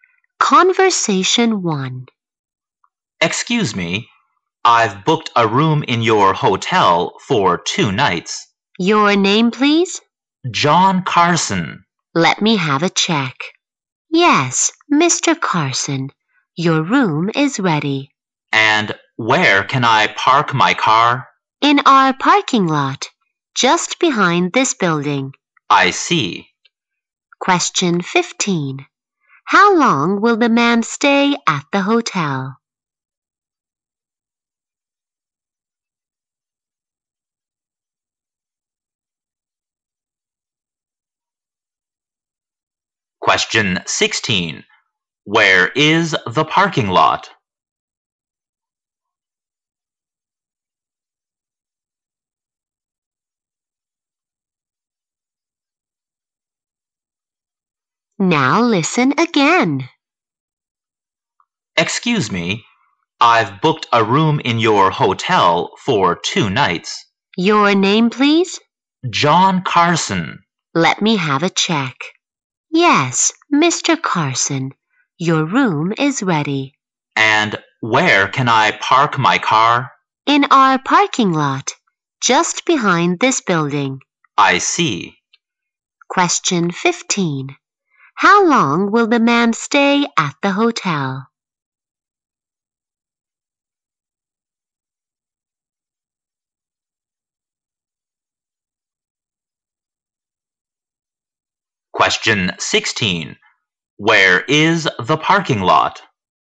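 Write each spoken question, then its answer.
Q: How long will the man stay at the hotel?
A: 2 nights.

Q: Where is the parking lot?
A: Just behind the hotel building.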